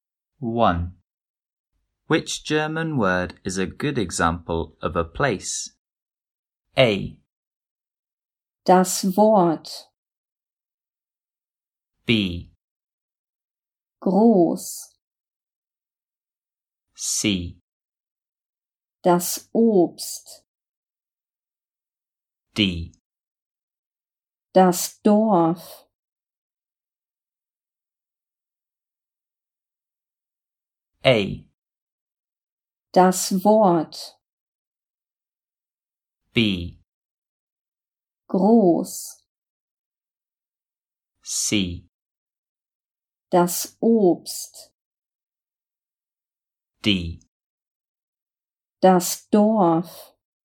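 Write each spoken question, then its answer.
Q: Which German word is a good example of a place?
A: D: Das Dorf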